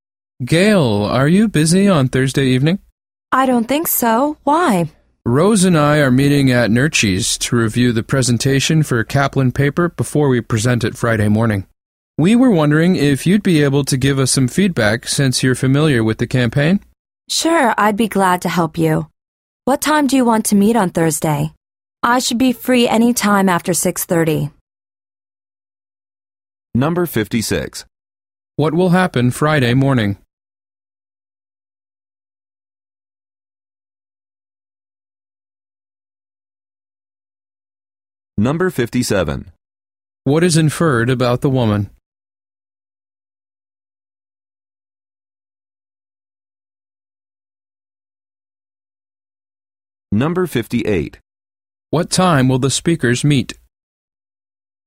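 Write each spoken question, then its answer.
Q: What will happen Friday morning?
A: They will give the presentation.

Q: What is inferred about the woman?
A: She is familiar with the campaign.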